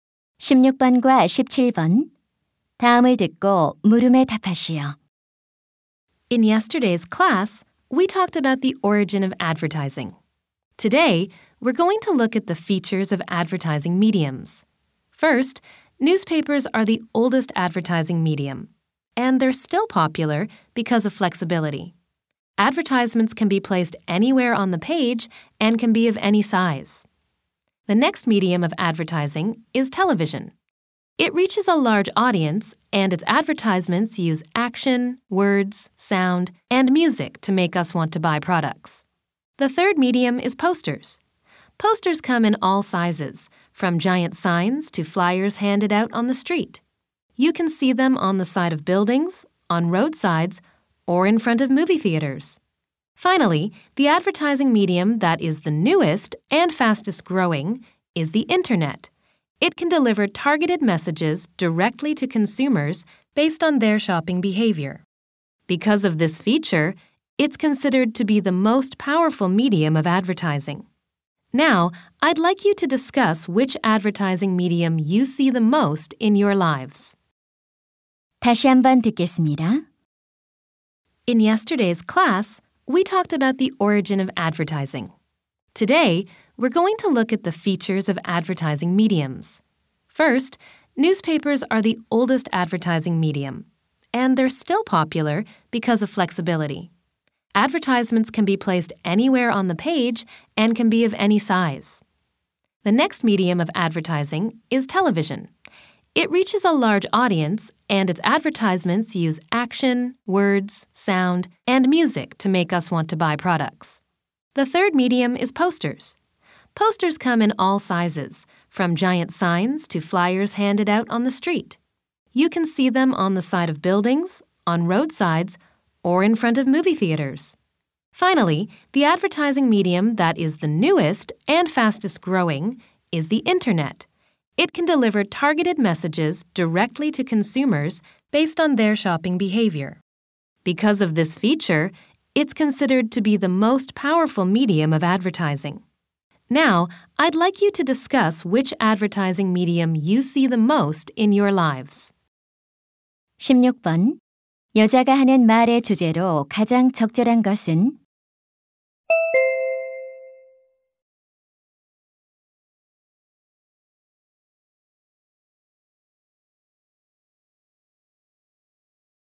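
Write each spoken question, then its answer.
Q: 여자가 하는 말의 주제로 가장 적절한 것은?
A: 광고 매체들의 특징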